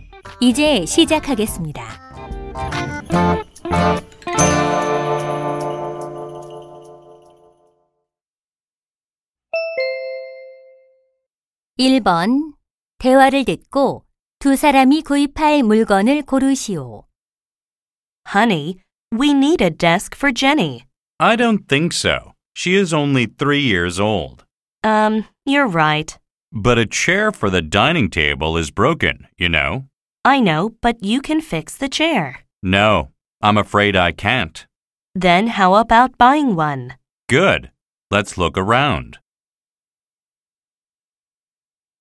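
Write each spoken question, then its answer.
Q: 대화를 듣고 두 사람이 구입할 물건을 고르시오.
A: 의자 (식탁 의자)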